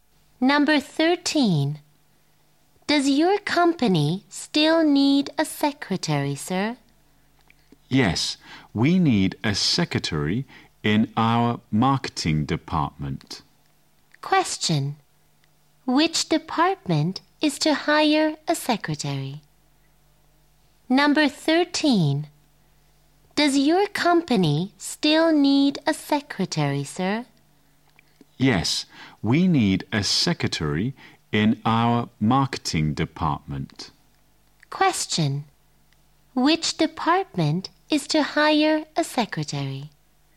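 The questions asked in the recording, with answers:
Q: Which department is to hire a secretary?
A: The marketing department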